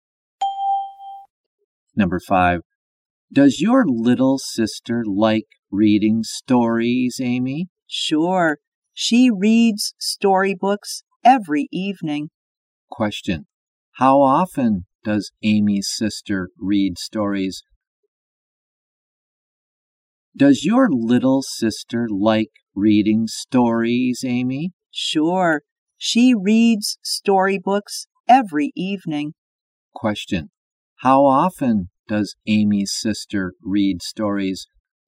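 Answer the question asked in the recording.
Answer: Every evening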